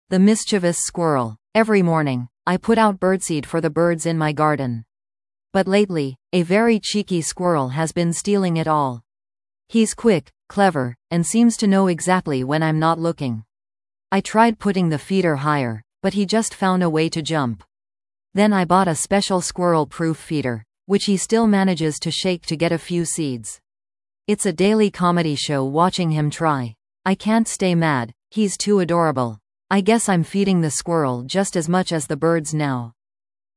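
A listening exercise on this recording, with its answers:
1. What animal has been stealing the birdseed?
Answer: A squirrel

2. How does the speaker feel about the squirrel's behavior?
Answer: Amused; can't stay mad because it's adorable

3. What happened when the speaker bought a "squirrel-proof" feeder?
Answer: The squirrel still shakes it to get a few seeds

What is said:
The Mischievous Squirrel
Every morning, I put out birdseed for the birds in my garden. But lately, a very cheeky squirrel has been stealing it all! He's quick, clever, and seems to know exactly when I'm not looking. I tried putting the feeder higher, but he just found a way to jump. Then I bought a special squirrel-proof feeder, which he still manages to shake to get a few seeds. It's a daily comedy show watching him try. I can't stay mad; he's too adorable. I guess I'm feeding the squirrel just as much as the birds now!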